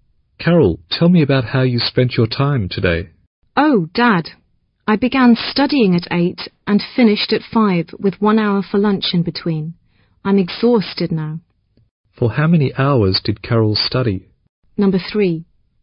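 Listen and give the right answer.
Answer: 8 hours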